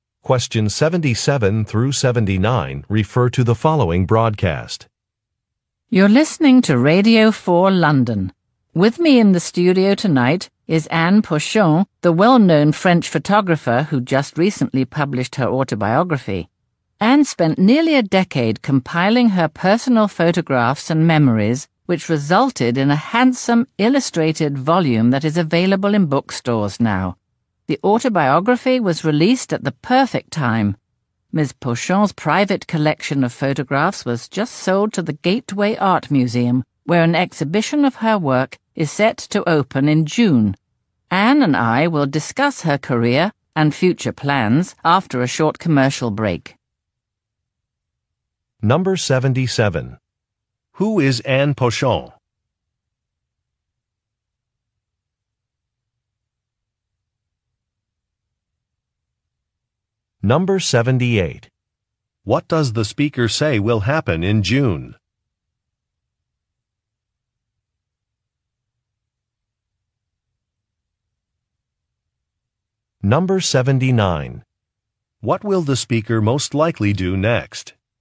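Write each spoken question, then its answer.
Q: Who is Anne Pochon?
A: A French photographer

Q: What does the speaker say will happen in June?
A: An exhibition of her work will open at the Gateway Art Museum

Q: What will the speaker most likely do next?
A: Play a commercial break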